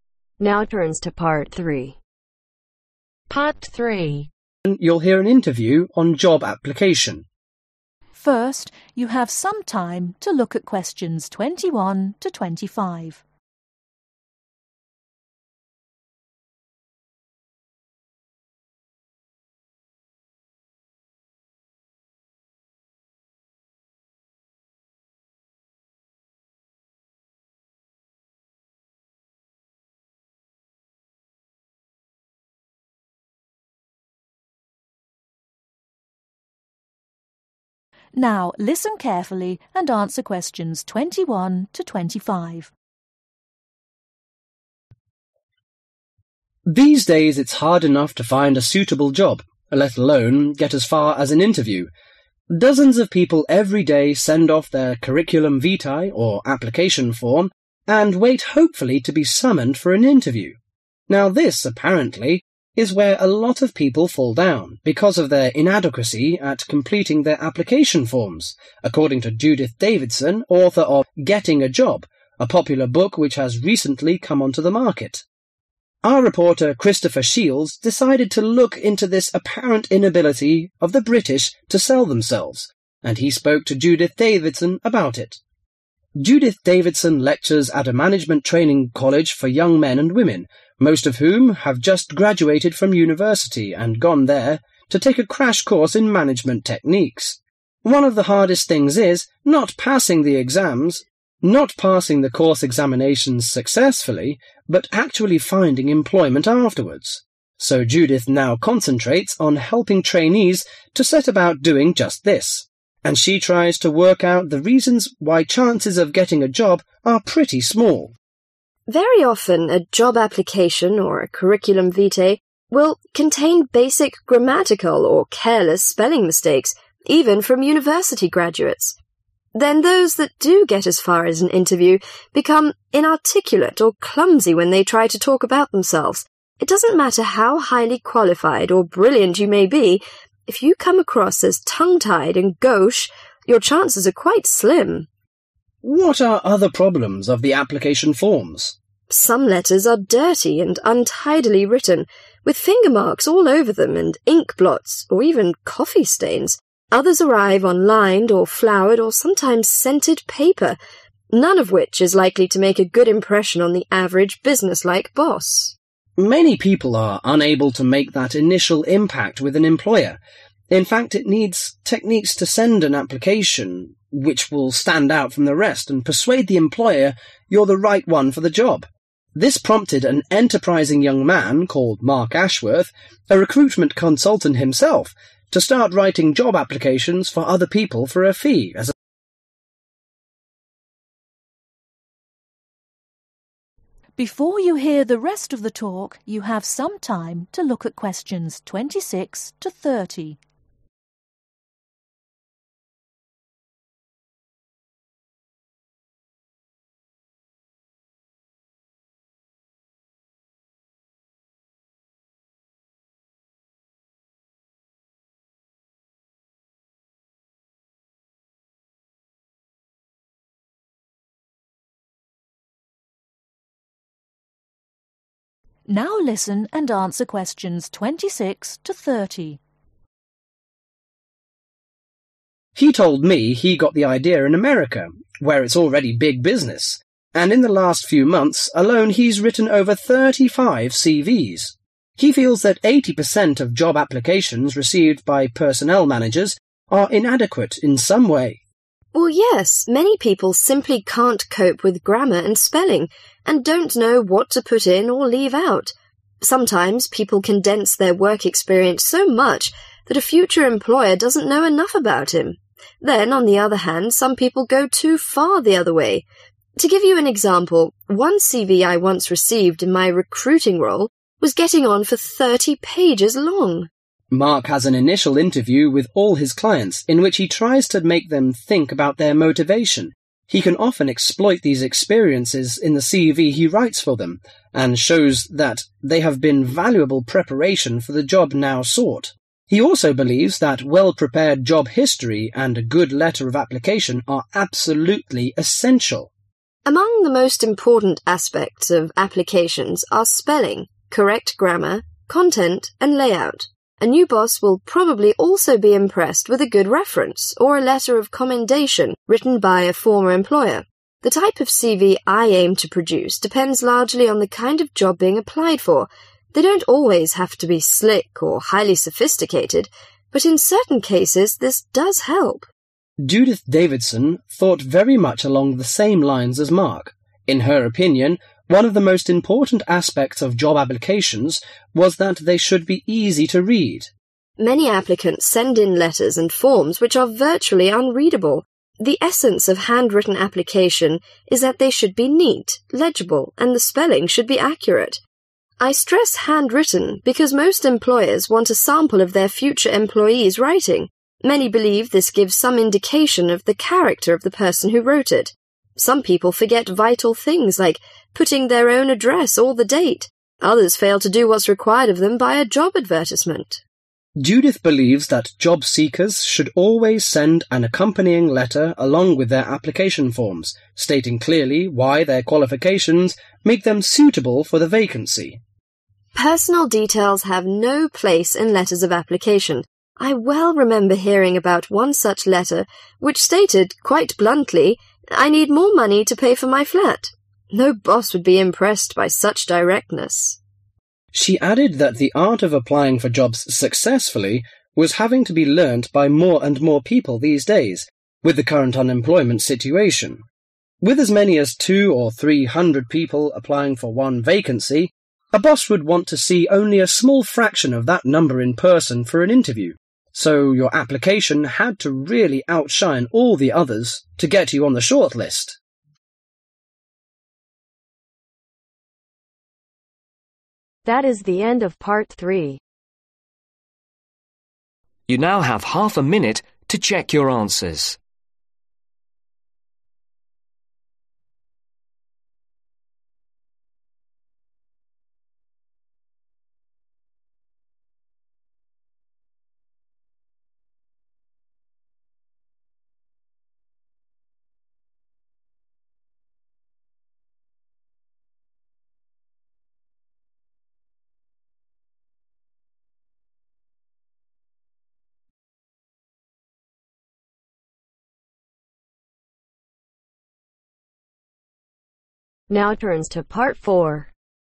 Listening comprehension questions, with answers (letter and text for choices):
Circle the correct letter.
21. According to Judith Davidson, may people fail in the job – hunting because they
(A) Can't complete their interviews.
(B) Are inadequate at interviews.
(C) Are not capable of accomplishing application forms.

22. What does Judith concentrate on helping management trainees to do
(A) How to graduate form universities.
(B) How to seek job after graduation.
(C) How to pass examinations successfully.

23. According to Judith, the chance of getting a job are small if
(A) The applications are not university graduates.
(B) The applicants are not skillful when talking the interviews.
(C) The applicants are not qualified and brilliant enough.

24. What are the other factors that prevent applications from succeeding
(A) Their application form are not tidy and normal enough to leave a good impression.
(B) The application form arrive late.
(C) They are often dirty or untidily dressed.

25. Which one of the following about Mark is TRUE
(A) He stands out from others and leave good impact with the employer.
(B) He changes for writing job applications for others.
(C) He is a full – time writer of job.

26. How many curriculum vitae has Mark written in the past few months ?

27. What does Mark think many people can't deal with in their forms ?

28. In the initial interview, what does Mark to make his clients consider ?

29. What decides the type of C.V. Mark aims to write the ?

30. What does Christopher think the applications should send along with the forms an ?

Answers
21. (C) Are not capable of accomplishing application forms.
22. (B) How to seek job after graduation.
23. (B) The applicants are not skillful when talking the interviews.
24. (A) Their application form are not tidy and normal enough to leave a good impression.
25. (B) He changes for writing job applications for others.
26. Over 35
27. Grammar and Spelling
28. Their Motivation
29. Kind of Job
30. Accompanying Letter